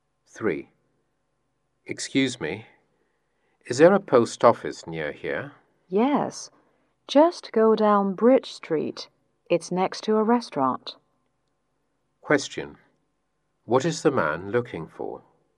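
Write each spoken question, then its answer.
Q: What is the man looking for?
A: A post office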